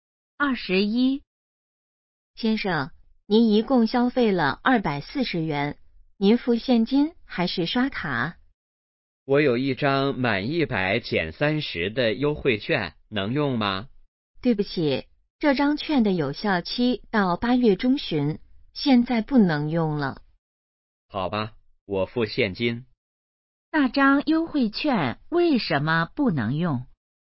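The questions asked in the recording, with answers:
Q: 那张优惠券为什么不能用?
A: 已经过了有效期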